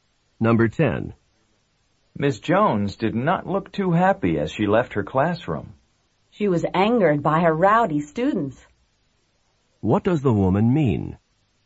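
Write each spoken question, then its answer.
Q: What does the woman mean?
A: Miss Jones was angry because her students were rowdy.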